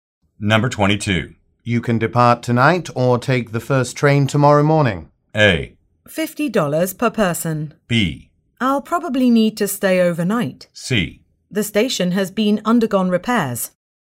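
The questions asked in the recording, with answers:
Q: You can depart tonight or take the first train tomorrow morning.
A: B: I'll probably need to stay overnight.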